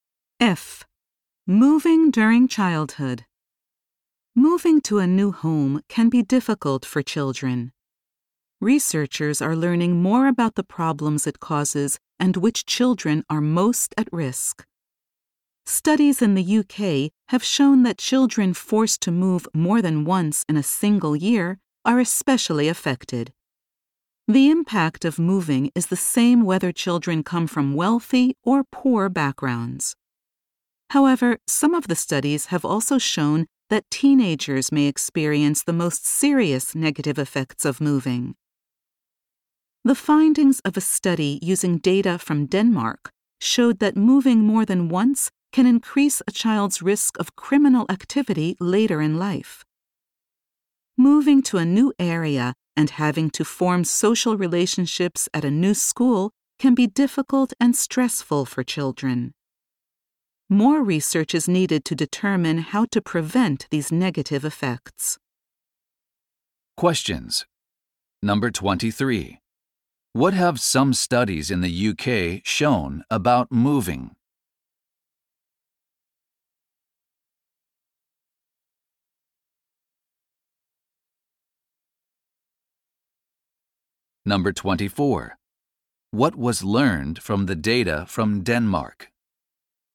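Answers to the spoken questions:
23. Moving more than once in a year especially affects children; teenagers may suffer most.
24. Moving more than once can increase a child's risk of criminal activity later in life.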